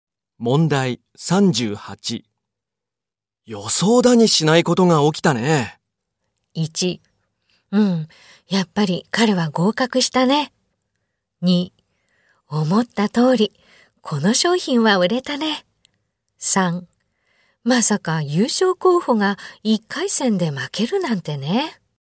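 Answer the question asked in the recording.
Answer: 3: まさか優勝候補が1回戦で負けるなんてね。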